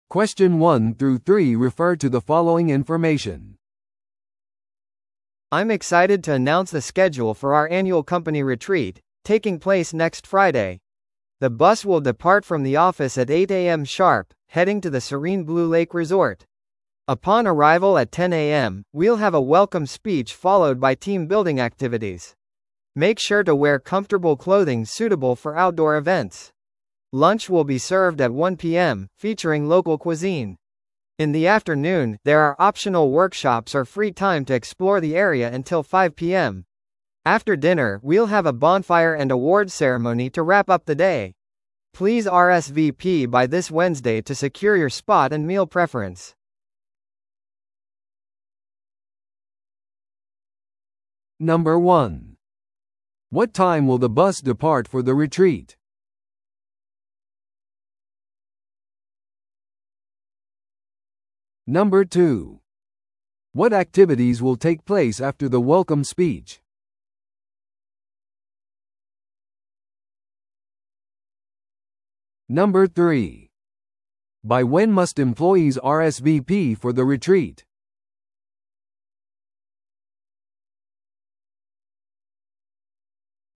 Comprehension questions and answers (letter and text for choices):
Listen to the audio below and answer the questions.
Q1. What time will the bus depart for the retreat?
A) 7時に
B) 8時に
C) 10時に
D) 1時に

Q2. What activities will take place after the welcome speech?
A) 自由時間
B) 表彰式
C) チームビルディングの活動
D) 夕食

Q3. By when must employees RSVP for the retreat?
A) 月曜日までに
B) 火曜日までに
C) 水曜日までに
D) 木曜日までに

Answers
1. B) 8時に
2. C) チームビルディングの活動
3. C) 水曜日までに

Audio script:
I'm excited to announce the schedule for our annual company retreat, taking place next Friday. The bus will depart from the office at 8am sharp, heading to the serene Blue Lake Resort. Upon arrival at 10am, we'll have a welcome speech followed by team-building activities. Make sure to wear comfortable clothing suitable for outdoor events. Lunch will be served at 1pm, featuring local cuisine. In the afternoon, there are optional workshops or free time to explore the area until 5pm. After dinner, we'll have a bonfire and awards ceremony to wrap up the day. Please RSVP by this Wednesday to secure your spot and meal preference.